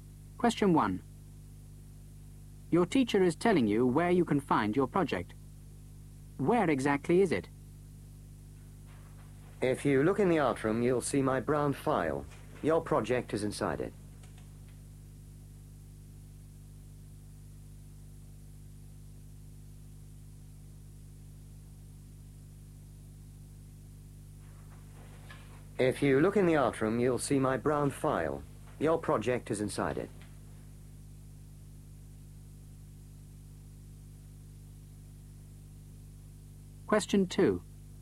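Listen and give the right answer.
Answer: Inside the teacher's brown file in the art room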